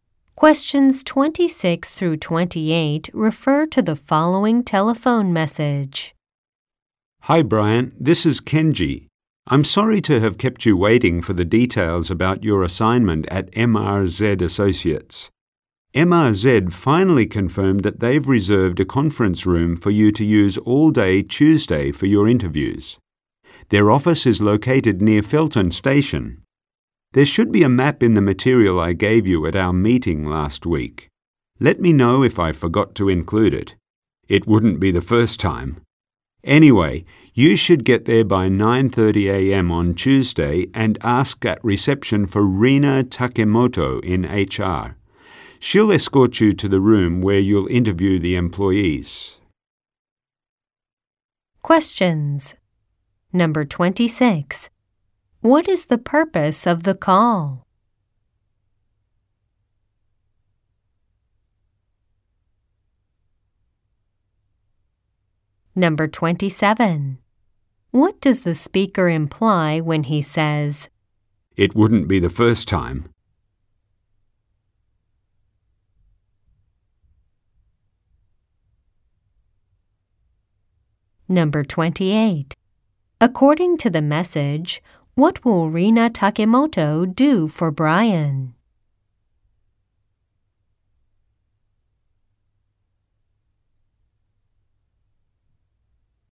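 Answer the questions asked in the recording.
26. To give Brian details about his interview assignment at MRZ Associates
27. He has forgotten to include things before
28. Take him to the room where he will interview employees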